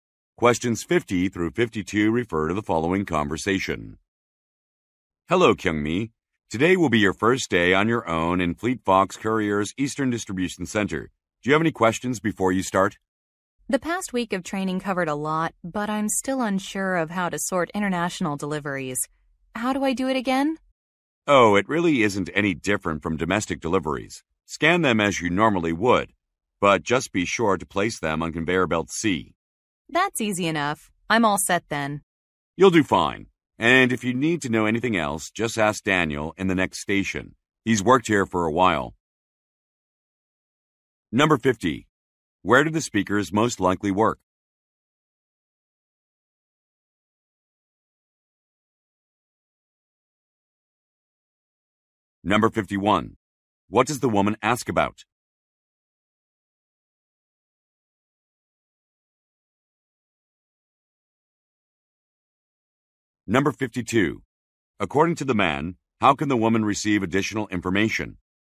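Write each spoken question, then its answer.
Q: Where do the speakers most likely work?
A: At a courier distribution center

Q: What does the woman ask about?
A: How to sort international deliveries

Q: According to the man, how can the woman receive additional information?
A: By asking Daniel at the next station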